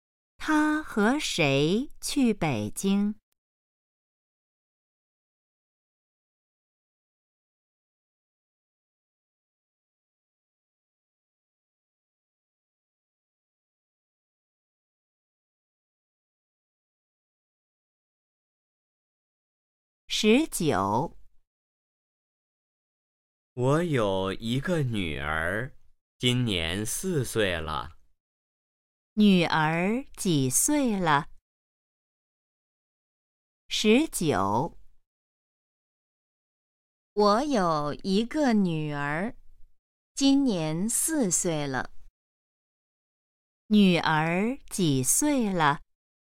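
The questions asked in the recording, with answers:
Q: 女儿几岁了?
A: 4岁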